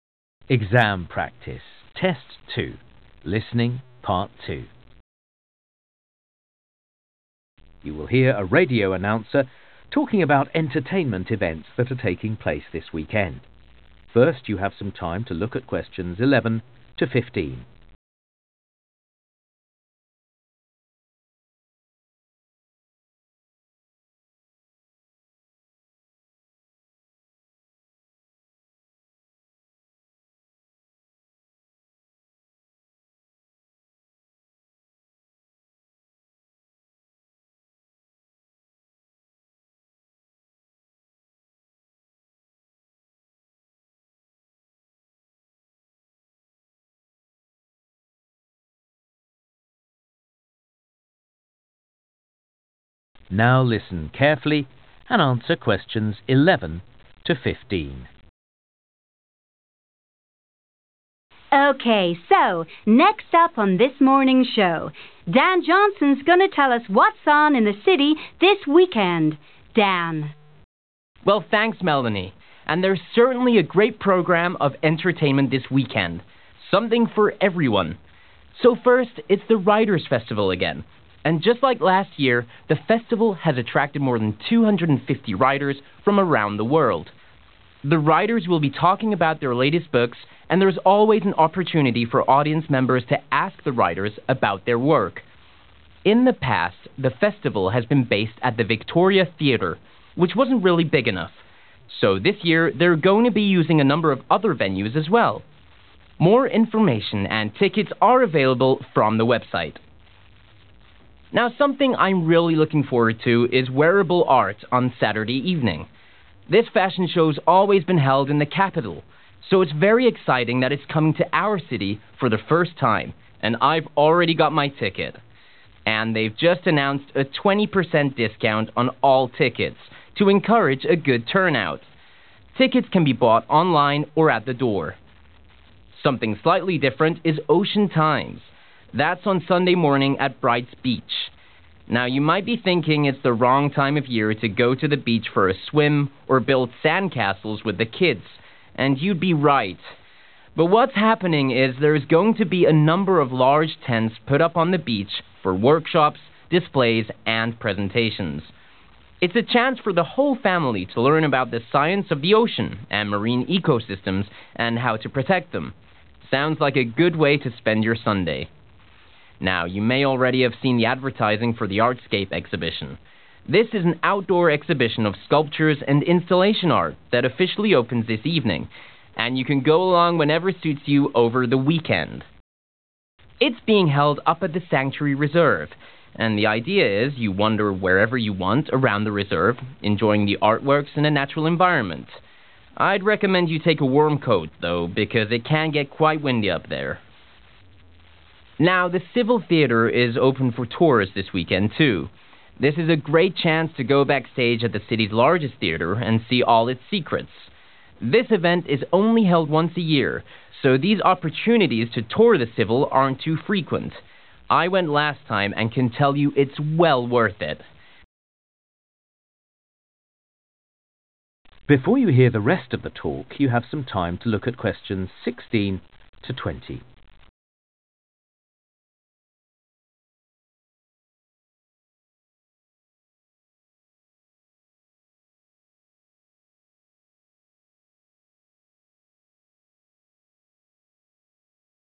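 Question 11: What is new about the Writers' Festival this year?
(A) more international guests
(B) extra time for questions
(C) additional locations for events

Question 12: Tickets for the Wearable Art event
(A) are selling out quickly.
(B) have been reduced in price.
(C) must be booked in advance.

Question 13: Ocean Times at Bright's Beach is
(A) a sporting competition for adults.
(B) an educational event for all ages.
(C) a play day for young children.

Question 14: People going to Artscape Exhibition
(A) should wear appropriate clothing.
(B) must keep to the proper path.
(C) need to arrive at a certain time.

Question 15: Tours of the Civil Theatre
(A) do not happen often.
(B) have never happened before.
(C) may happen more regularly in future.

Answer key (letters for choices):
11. C
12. B
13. B
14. A
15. A

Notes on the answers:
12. Don: And they've just announced a 20% discount on all tickets (họ vừa thông báo giảm giá 20% cho tất cả các vé), to encourage a good turnout.
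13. Don: It's a chance for the whole family to learn about the science of the ocean and marine eco-systems and how to protect them. (Đây là cơ hội để cả gia đình tìm hiểu về khoa học của đại dương và các hệ sinh thái biển cũng như cách bảo vệ chúng.)
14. Don: I'd recommend you take a warm coat, though, because it can get quite windy up there. (Tuy nhiên, tôi khuyên bạn nên mang theo một chiếc áo khoác ấm vì ở đó có thể là một ngày lộng gió.)
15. Don: This event is only held once a year so these opportunities to tour the Civil aren't too frequent. (Sự kiện này chỉ được tổ chức mỗi năm một lần nên những cơ hội tham quan nhà hát Civil không quá thường xuyên.)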